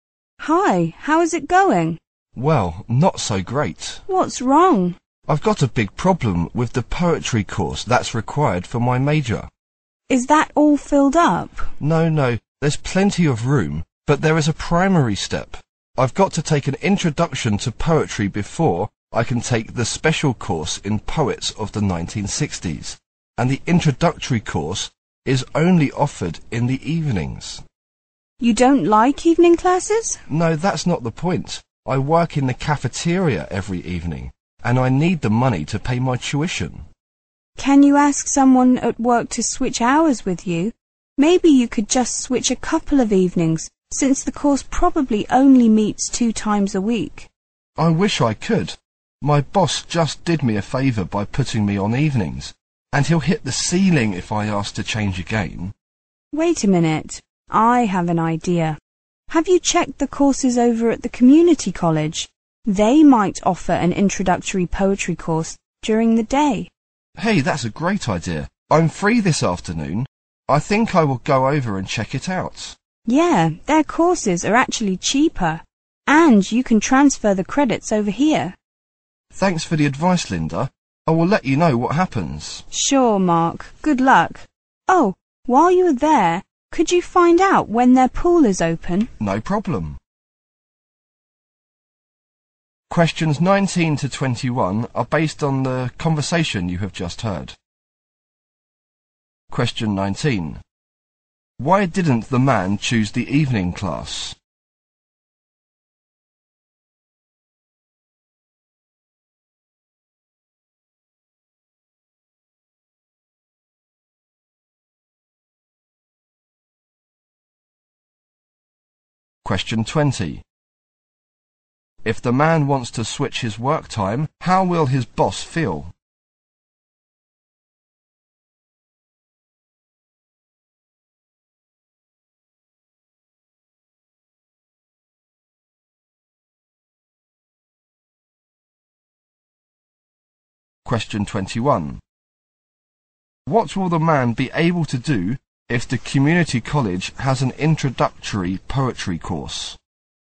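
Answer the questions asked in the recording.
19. Because he works in the cafeteria every evening to pay his tuition.
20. He will be very angry.
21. Take it during the day and transfer the credits.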